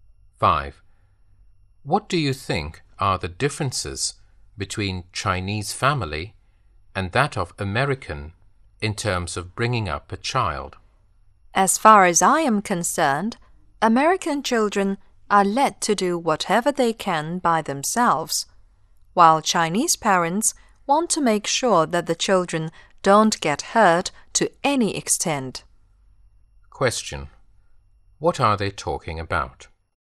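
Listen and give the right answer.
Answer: Differences between Chinese and American ways of bringing up children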